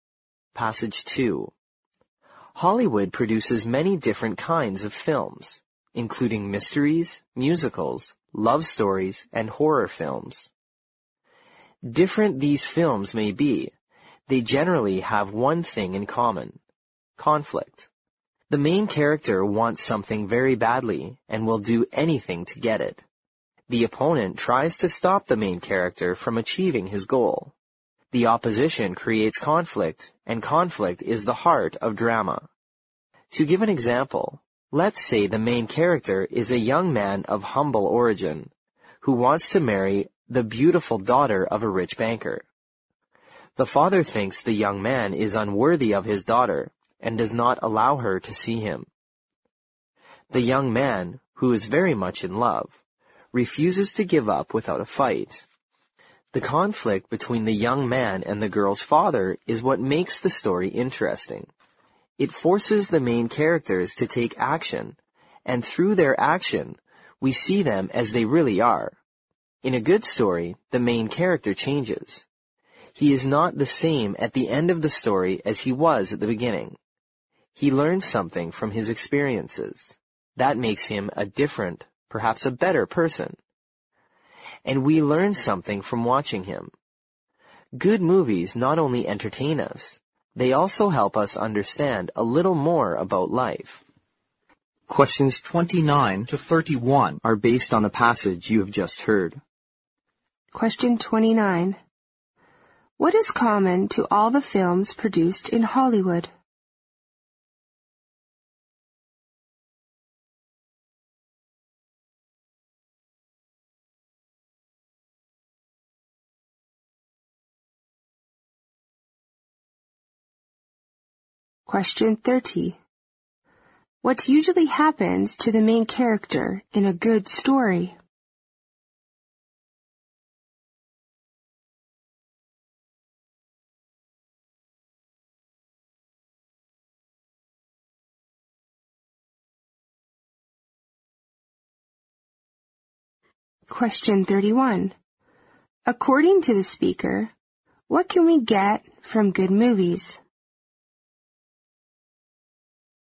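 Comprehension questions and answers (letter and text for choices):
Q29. 29.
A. Love.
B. Conflict.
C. Violence.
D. Mystery.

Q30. 30.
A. The main character remains the same.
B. The main character realizes his dreams.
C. The main character dies in the end.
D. The main character undergoes a change.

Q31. 31.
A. We can learn how bad persons improve themselves.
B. We can learn how to get along with other people.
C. We can understand life a bit better.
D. We can find more ways to kill time.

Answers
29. B. Conflict.
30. D. The main character undergoes a change.
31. C. We can understand life a bit better.

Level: 六级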